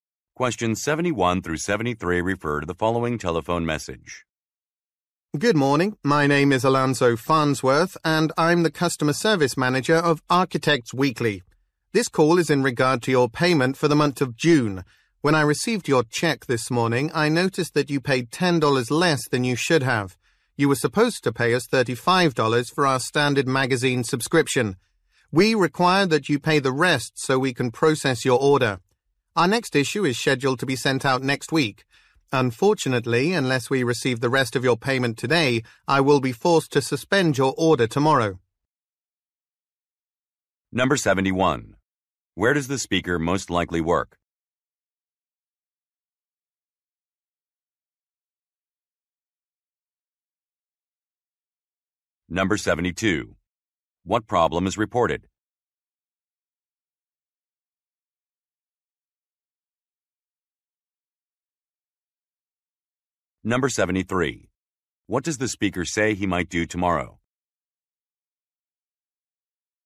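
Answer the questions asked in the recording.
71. At a magazine publisher (Architects Weekly)
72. A payment was $10 short
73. Suspend the order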